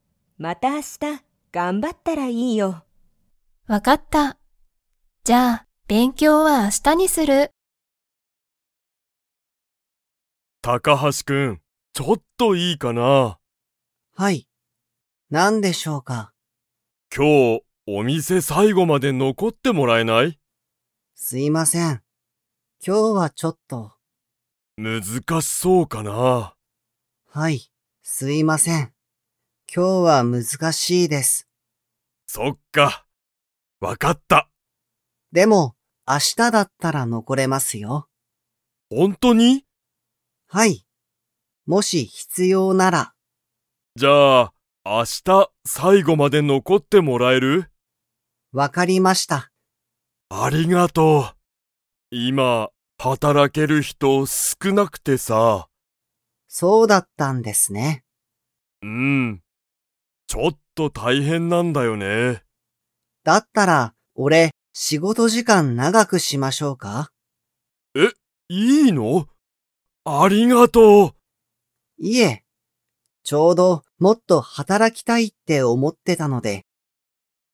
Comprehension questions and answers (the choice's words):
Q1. 高橋(たかはし)さんは今日(きょう)、お店(みせ)に最後(さいご)まで残(のこ)れますか?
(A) はい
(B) いいえ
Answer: いいえ

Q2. 高橋(たかはし)さんは、____を長(なが)くする。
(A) お店(みせ)の日(ひ)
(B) 休(やす)みの時間(じかん)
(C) 働(はたら)ける人(ひと)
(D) 仕事しごとの時間じかん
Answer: 仕事しごとの時間じかん

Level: Level 2